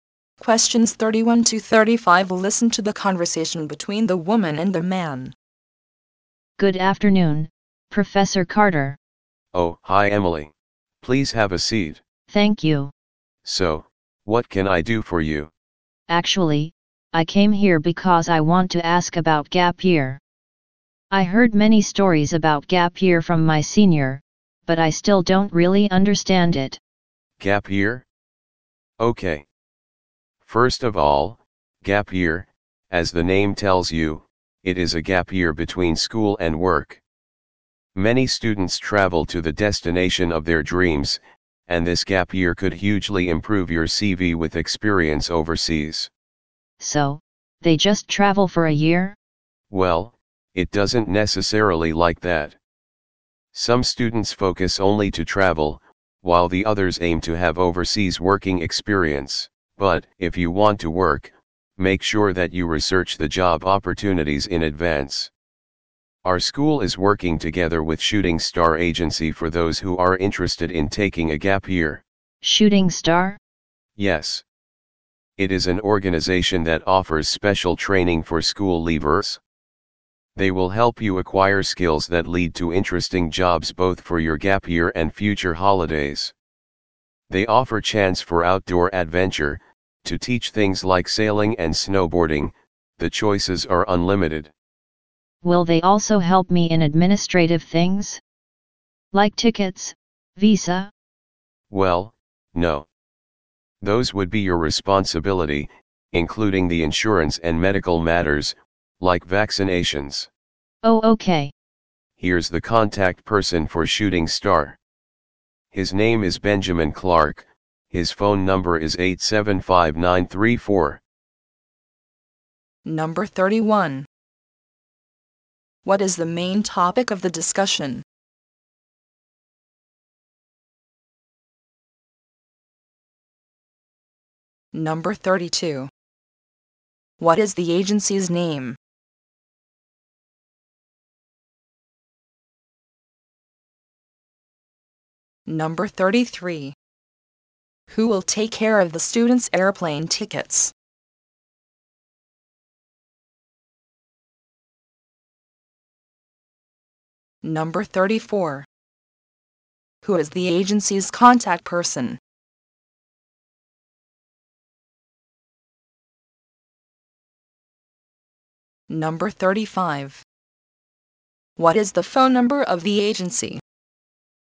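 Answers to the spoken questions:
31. Gap year
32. Shooting Star Agency
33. The students themselves
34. Benjamin Clark
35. 875934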